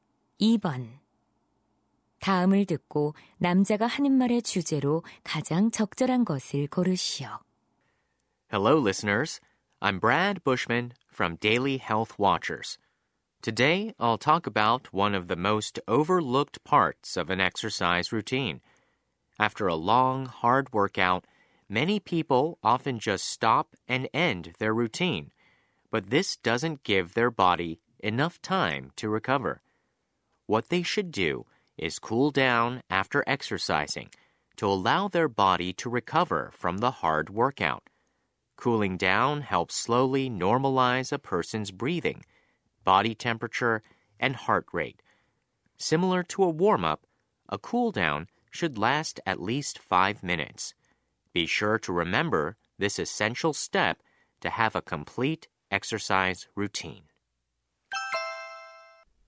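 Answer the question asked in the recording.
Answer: 운동 후 정리 운동의 중요성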